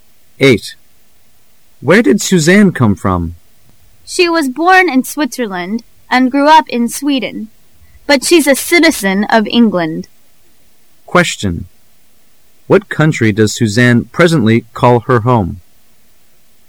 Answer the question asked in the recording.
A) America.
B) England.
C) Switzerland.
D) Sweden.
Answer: B) England.

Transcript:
[解析] M: Where did Suzanne come from? W: She was born in Switzerland and grew up in Sweden, but she's a citizen of England. Q: What country does Suzanne presently call her home?